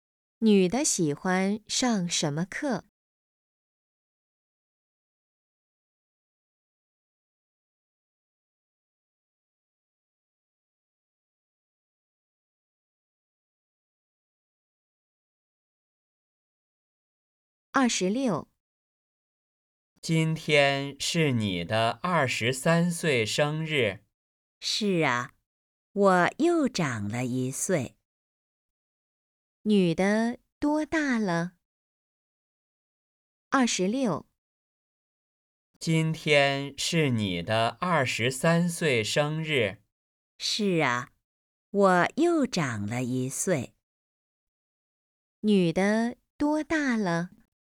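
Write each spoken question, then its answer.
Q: 女的多大了?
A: 二十三岁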